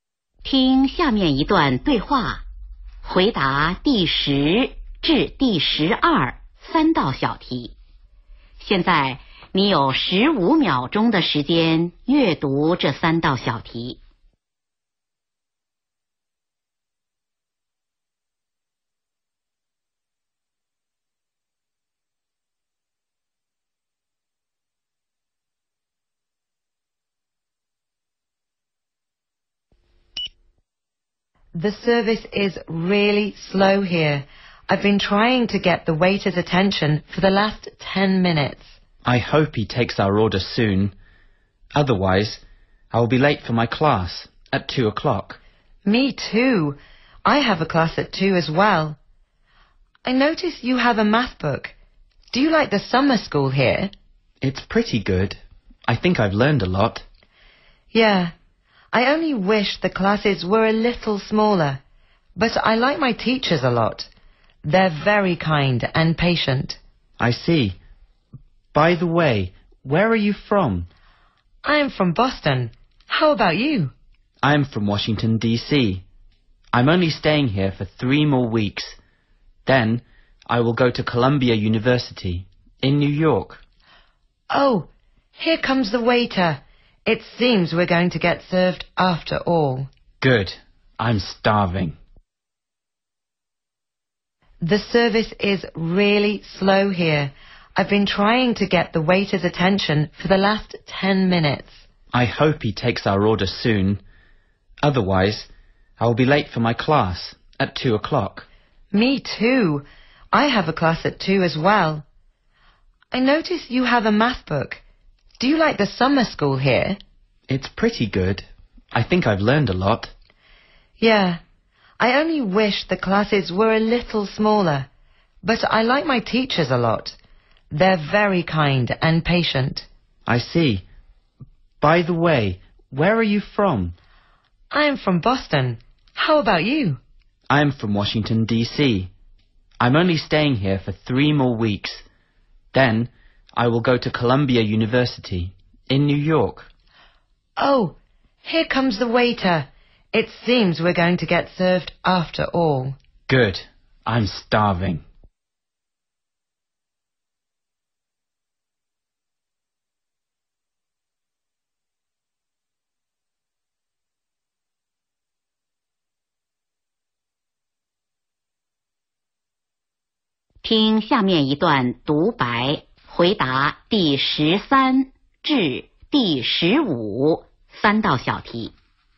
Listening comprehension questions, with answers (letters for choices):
听第 8 段材料,回答第 10 至 12 题。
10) Where are the two speakers?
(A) In the library.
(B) In the café.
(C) In the classroom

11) What does the woman like about the summer school?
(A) The size of the class.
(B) The math book.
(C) The teachers.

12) Where is the man planning to do?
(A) Boston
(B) Washington D.C.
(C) New York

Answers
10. B
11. C
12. C